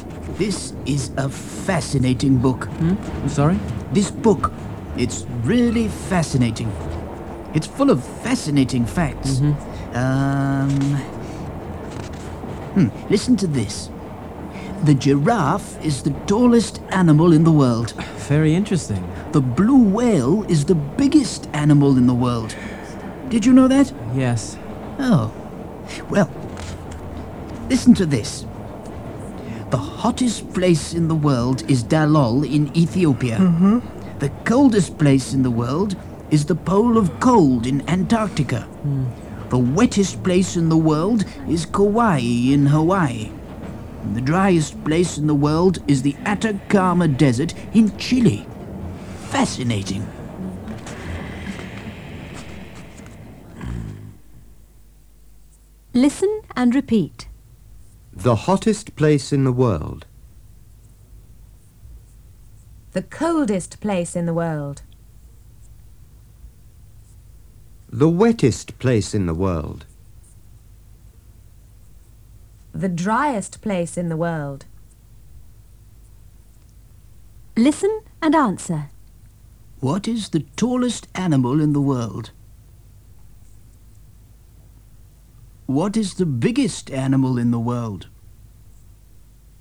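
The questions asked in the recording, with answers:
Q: What is the tallest animal in the world?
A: The giraffe

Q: What is the biggest animal in the world?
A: The blue whale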